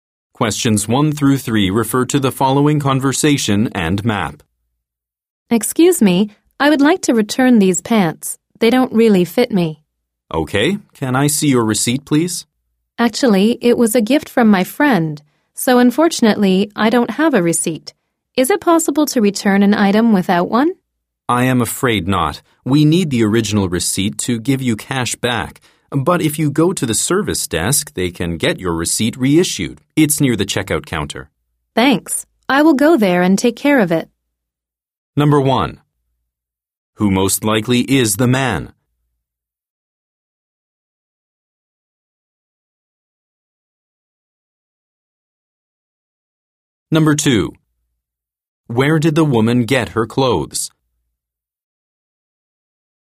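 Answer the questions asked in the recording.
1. A store clerk
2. From her friend, as a gift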